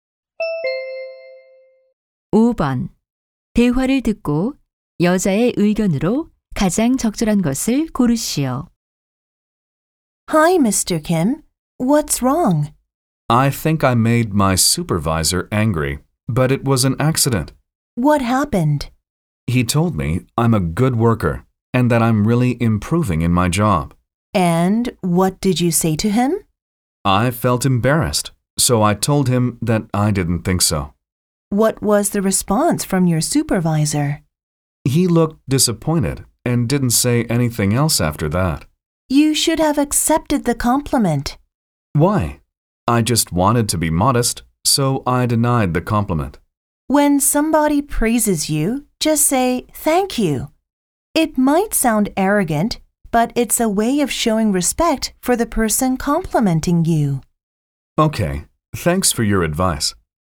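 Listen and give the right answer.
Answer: 칭찬을 받으면 겸손하게 부인하지 말고 감사하다고 받아들여야 한다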